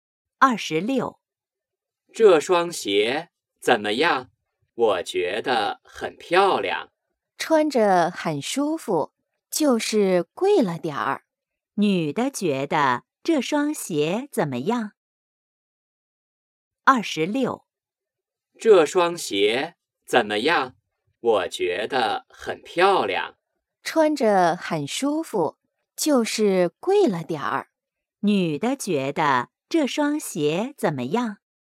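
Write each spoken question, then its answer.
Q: 女的觉得这双鞋怎么样?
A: 很舒服,但有点贵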